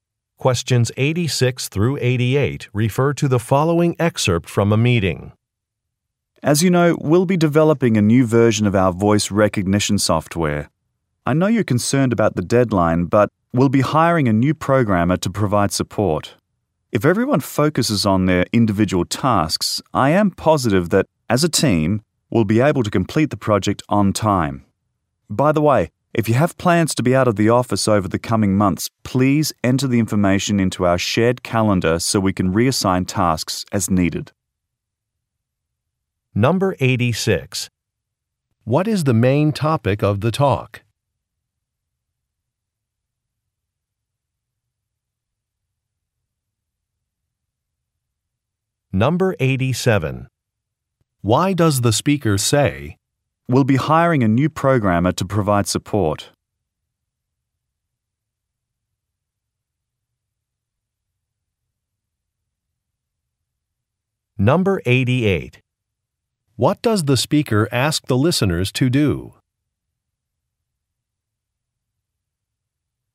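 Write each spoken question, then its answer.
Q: What is the main topic of the talk?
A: Developing a new version of voice recognition software

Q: Why does the speaker say,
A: To reassure listeners about meeting the deadline

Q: What does the speaker ask the listeners to do?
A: Enter planned time out of the office in the shared calendar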